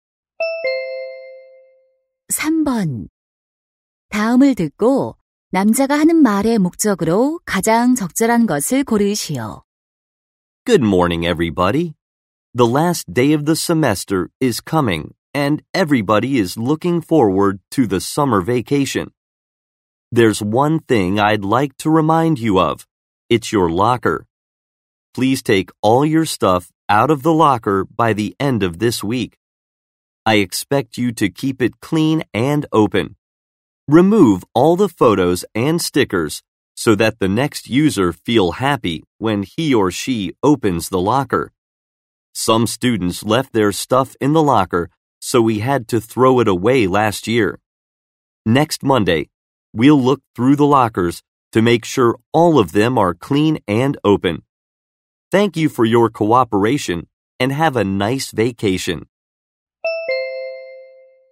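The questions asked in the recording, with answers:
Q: 다음을 듣고 남자가 하는 말의 목적으로 가장 적절한 것을 고르시오.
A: 이번 주 말까지 사물함을 비우도록 당부하려고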